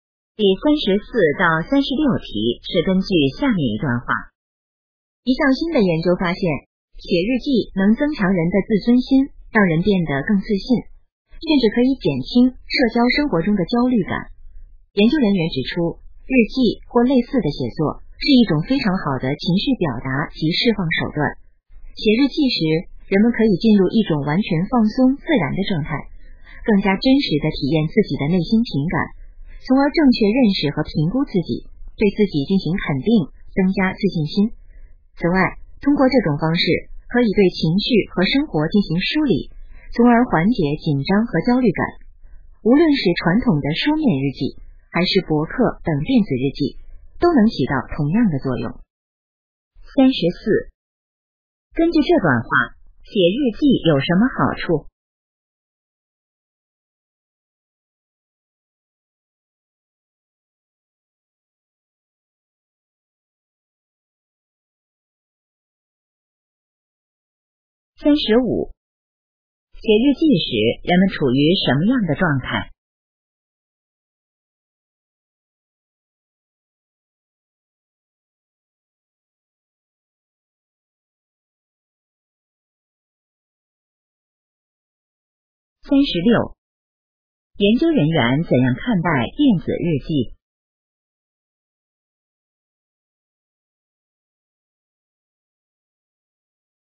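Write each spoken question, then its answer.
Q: 根据这段话,写日记有什么好处?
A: 增强自尊心和自信,减轻焦虑

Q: 写日记时人们处于什么样的状态?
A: 完全放松自然的状态

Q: 研究人员怎样看待电子日记?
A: 和书面日记作用一样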